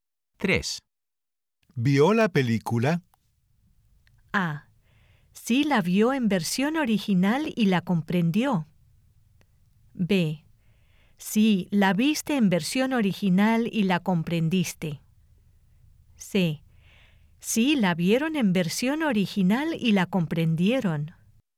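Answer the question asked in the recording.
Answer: A: Sí, la vio en versión original y la comprendió.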